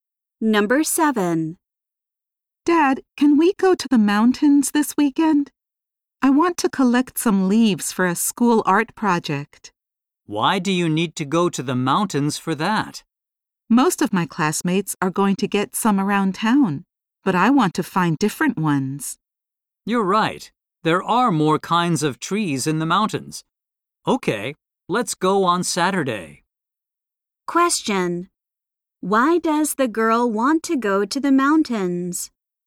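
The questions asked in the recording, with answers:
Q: Why does the girl want to go to the mountains?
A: To find different kinds of leaves for her school art project.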